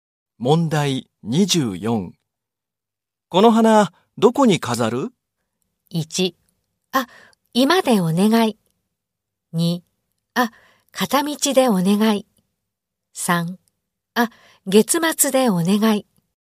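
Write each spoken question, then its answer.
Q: この花、どこに飾る?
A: 1: あ、居間でお願い。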